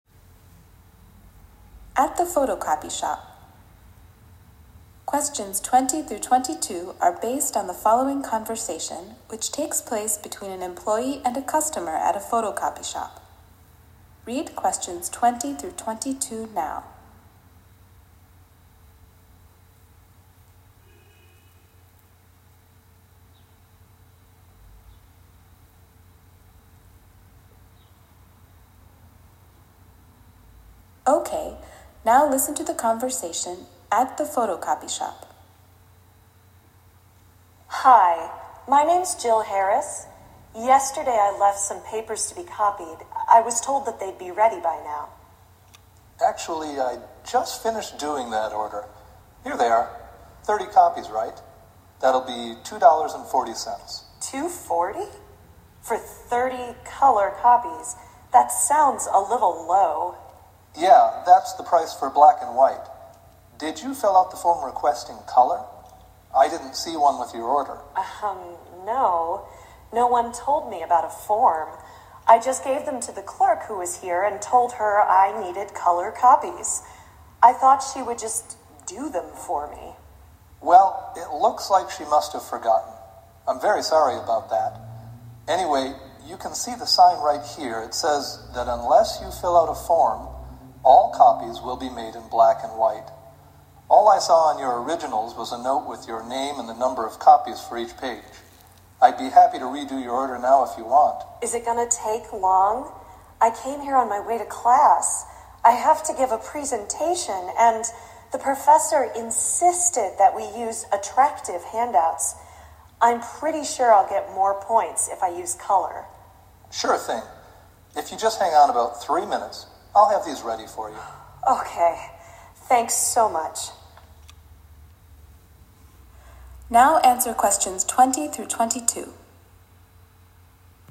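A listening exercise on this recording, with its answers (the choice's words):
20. Why is the woman visiting the copy center?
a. to place an order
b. to find out the cost of an order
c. to pick up an order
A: to pick up an order

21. Why does the woman want color copies?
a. She thinks they will help her grade.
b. Her professor told everyone to use color handouts.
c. They cost about the same as black and white copies.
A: She thinks they will help her grade.

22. What does the man offer to do?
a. fill out a form for her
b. redo her copies right away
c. give her the copies for free.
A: redo her copies right away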